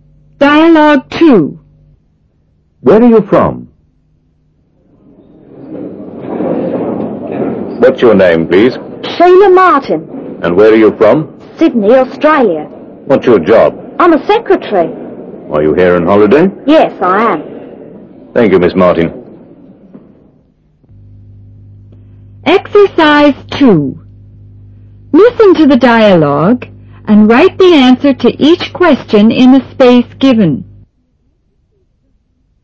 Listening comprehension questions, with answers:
II. Listen to the dialogue and write the answer to each question in the space given.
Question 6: A: What's your name,please?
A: Sheila Martin

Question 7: A: And where are your from?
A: Sydney, Australia

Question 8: A: What's your job?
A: I'm a secretary

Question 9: A: Are you here on holiday?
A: Yes, I am

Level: 英语听力入门